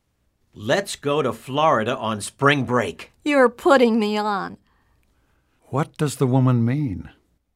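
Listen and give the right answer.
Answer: She thinks the man is joking.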